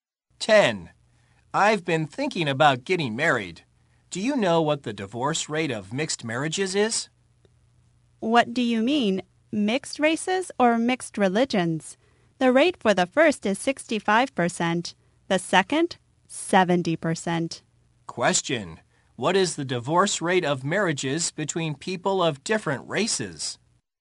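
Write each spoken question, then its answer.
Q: What is the divorce rate of marriages between people of different races?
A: 65%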